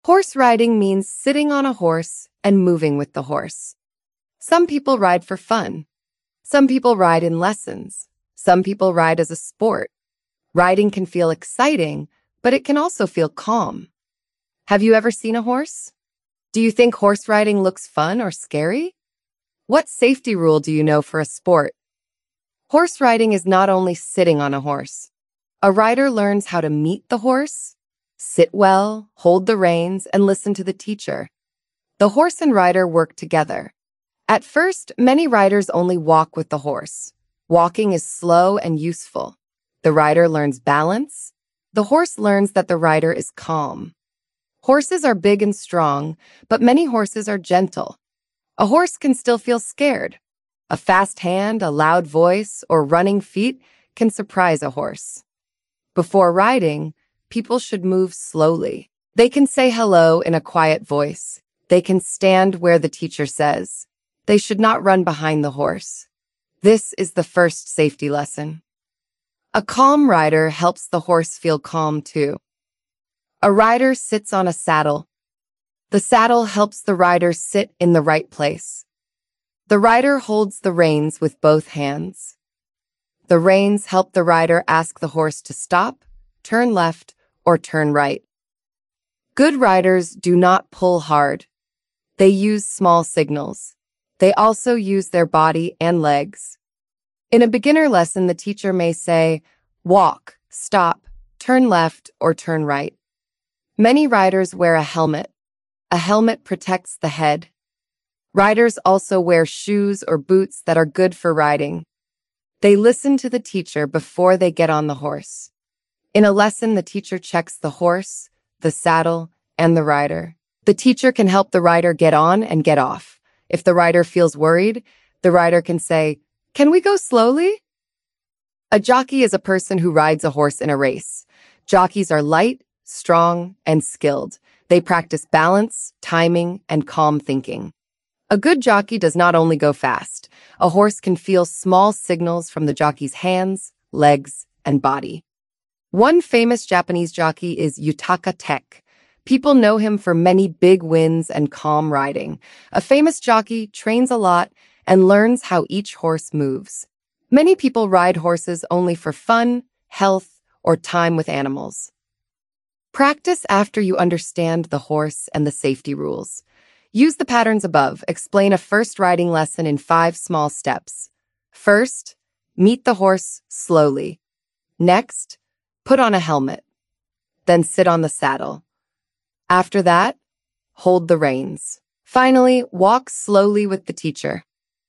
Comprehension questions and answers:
Check your understanding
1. What do a horse and rider do together?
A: They work together.

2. Why should people move slowly near a horse?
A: Because a horse can feel scared if people move too fast.

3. What do the reins help the rider do?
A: The reins help the rider ask the horse where to go.

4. Why do many riders wear a helmet?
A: A helmet protects the head.

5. What does a jockey do?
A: A jockey rides a horse in a race.

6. What is the first step in this practice?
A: The first step is to meet the horse slowly.